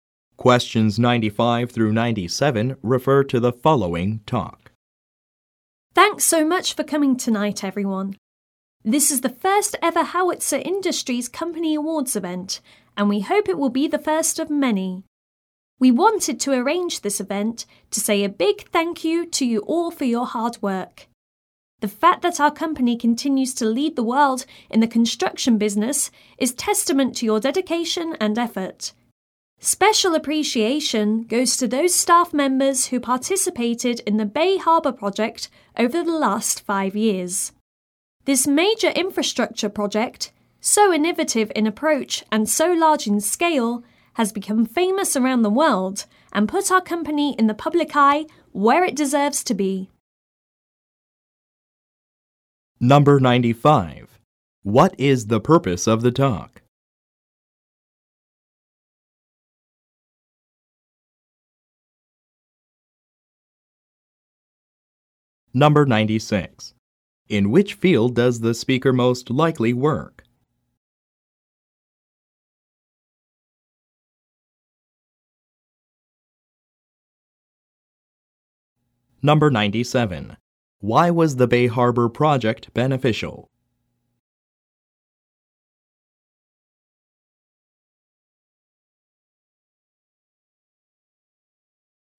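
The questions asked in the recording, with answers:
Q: What is the purpose of the talk?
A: To thank the staff for their hard work at the company awards event

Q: In which field does the speaker most likely work?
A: Construction

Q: Why was the Bay Harbor project beneficial?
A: It became famous worldwide and put the company in the public eye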